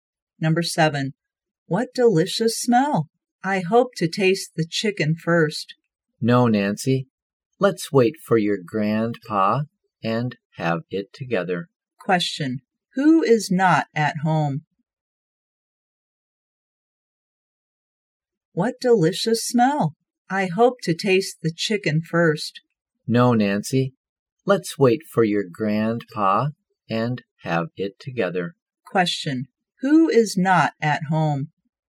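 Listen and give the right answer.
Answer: Nancy's grandpa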